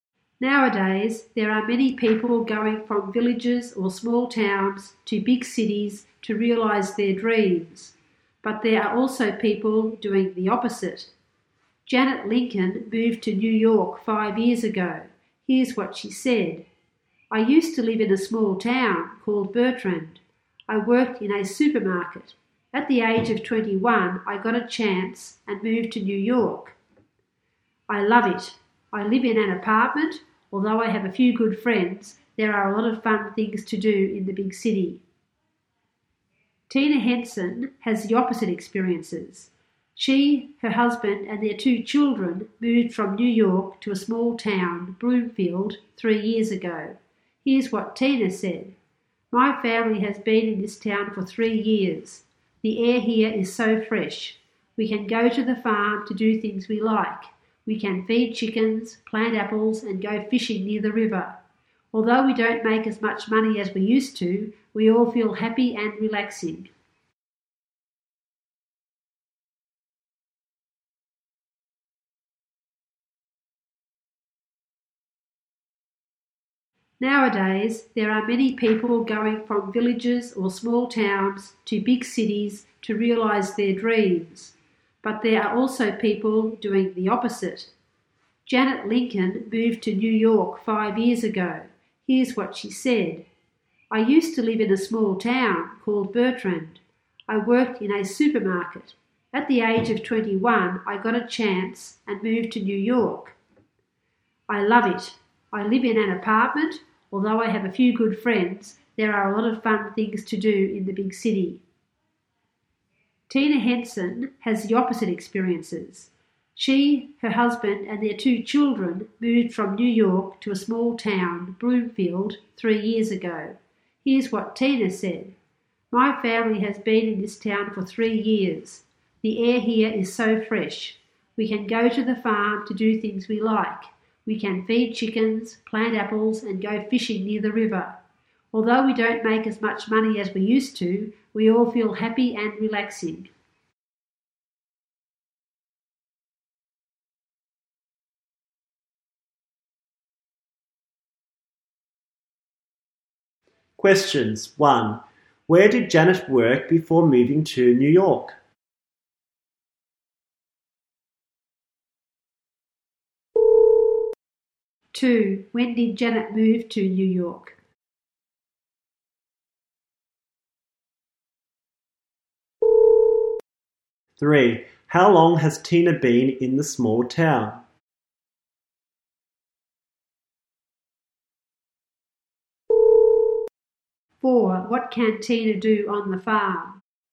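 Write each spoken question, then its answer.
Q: Where did Janet work before moving to New York?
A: In a supermarket

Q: When did Janet move to New York?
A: 5 years ago, at the age of 21

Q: How long has Tina been in the small town?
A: 3 years

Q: What can Tina do on the farm?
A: Feed chickens, plant apples and go fishing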